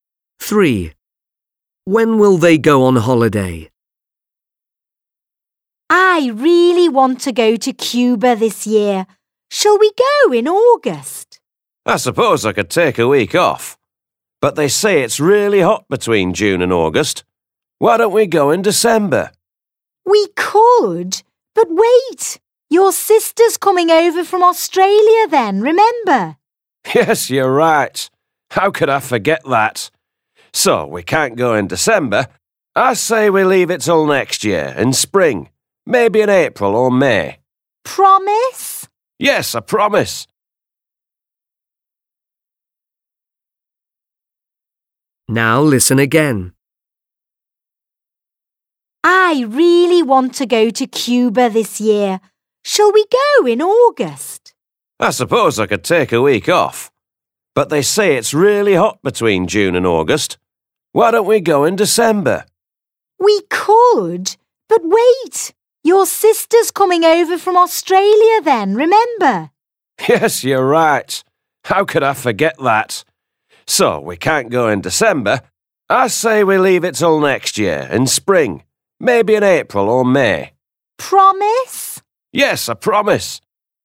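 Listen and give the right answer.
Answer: Next year in spring (April or May)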